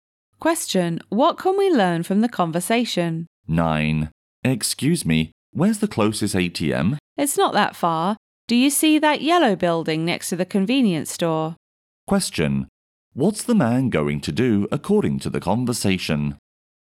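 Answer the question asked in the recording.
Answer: Go to the ATM to get money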